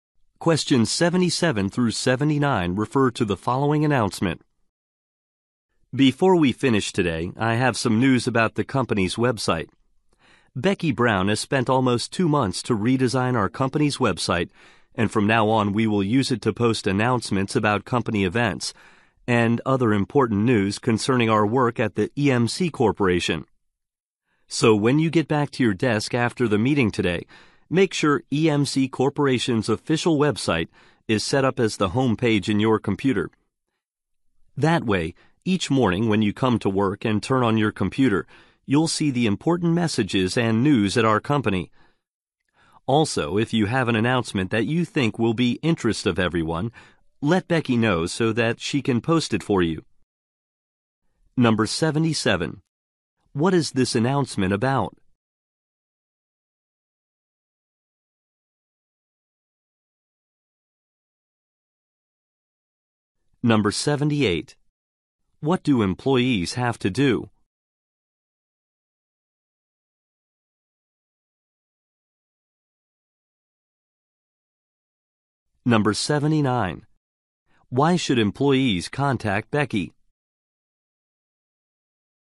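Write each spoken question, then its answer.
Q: What is this announcement about?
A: The company's redesigned website

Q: What do employees have to do?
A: Set the company website as their computer's home page

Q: Why should employees contact Becky?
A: To have an announcement posted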